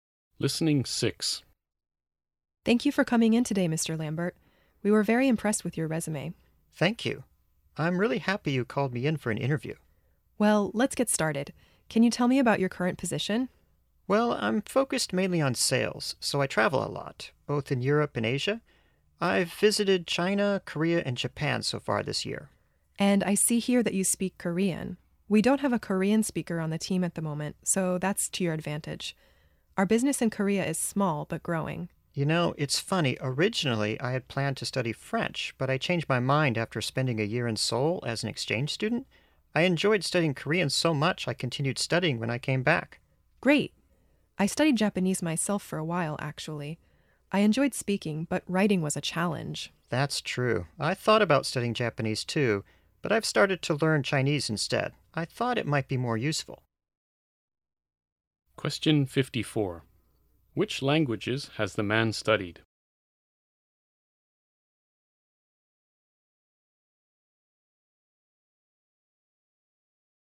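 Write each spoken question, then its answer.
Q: Which languages has the man studied?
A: Korean and Chinese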